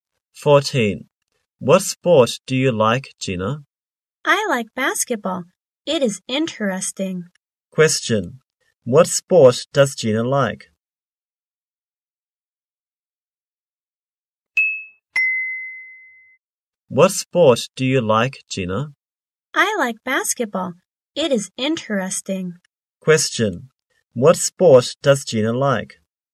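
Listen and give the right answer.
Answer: Basketball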